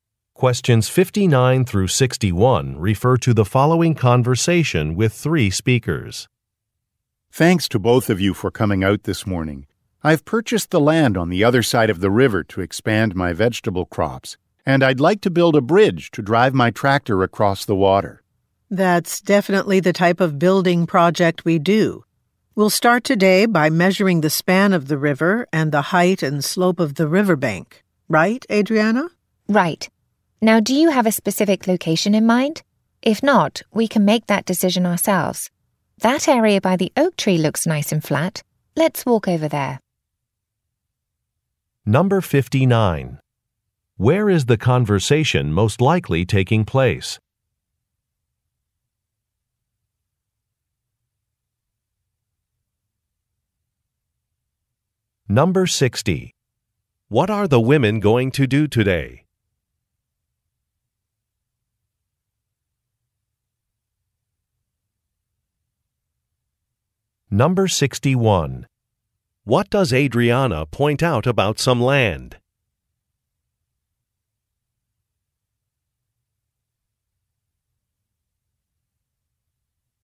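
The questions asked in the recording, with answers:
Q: Where is the conversation most likely taking place?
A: On a farm

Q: What are the women going to do today?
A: Measure the river and riverbank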